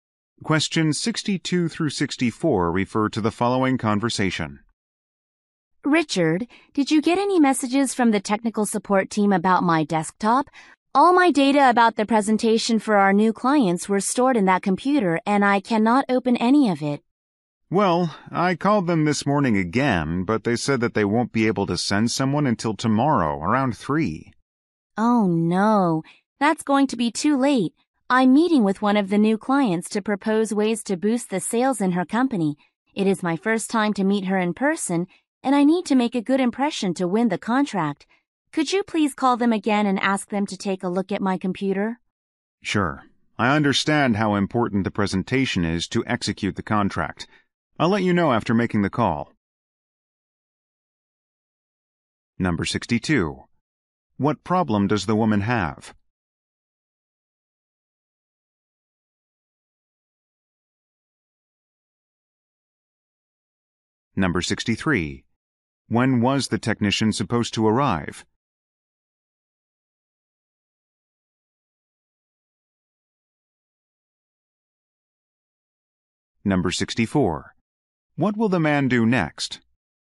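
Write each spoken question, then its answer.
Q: What problem does the woman have?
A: She can't open the data on her computer

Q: When was the technician supposed to arrive?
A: Tomorrow around 3

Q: What will the man do next?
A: Call technical support again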